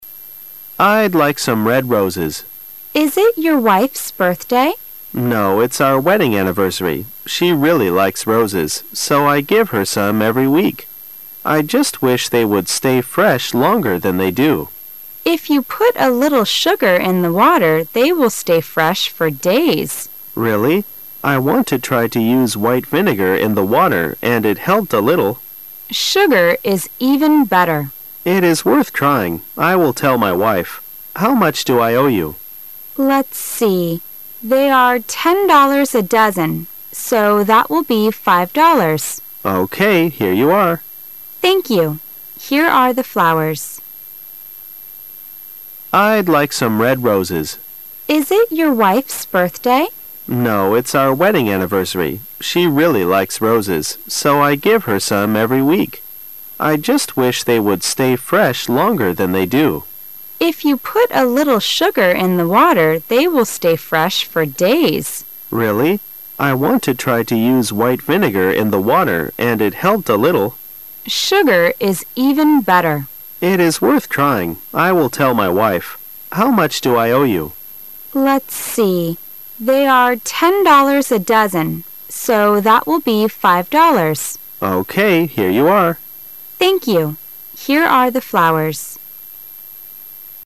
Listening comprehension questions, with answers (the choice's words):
Why does the man buy some red roses?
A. Because it's their wedding anniversary.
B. Because it's his wife's birthday.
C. Because it's his birthday.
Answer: Because it's their wedding anniversary.

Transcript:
W: Is it your wife's birthday? M: No, it's our wedding anniversary. She really likes roses. So I give her some every week. I just wish they would stay fresh longer than they do. W: If you put a little sugar in the water they will stay fresh for days. M: Really? I want to try to use white vinegar in the water and it helped a little. W: Sugar is even better. M: It is worth trying, I will tell my wife. How much do I owe you? W: Let's see. They are $ 10 a dozen. So that will be $ 5.00. Here you are. W: Thank you. Here are the flowers.